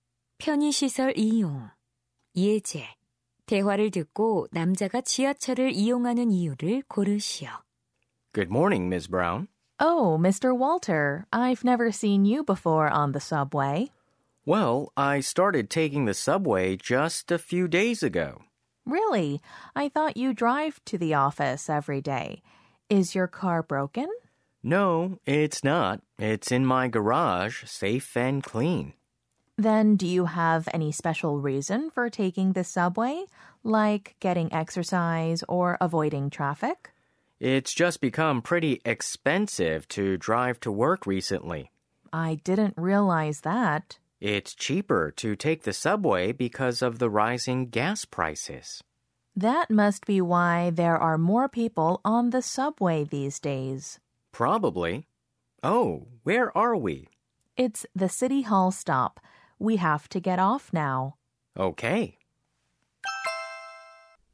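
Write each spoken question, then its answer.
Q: 대화를 듣고 남자가 지하철을 이용하는 이유를 고르시오.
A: 휘발유 가격 상승으로 운전 비용이 비싸져서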